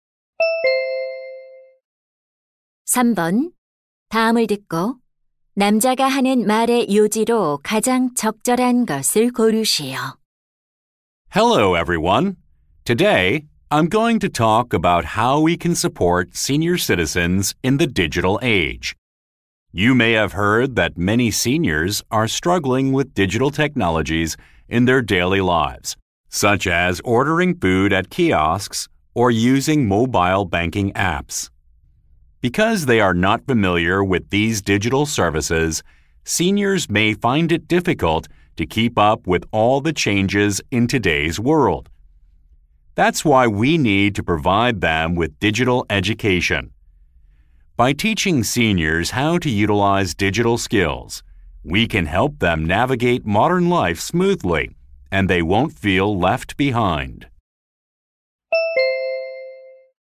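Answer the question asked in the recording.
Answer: 노인들이 디지털 시대에 적응하도록 디지털 교육을 제공해야 한다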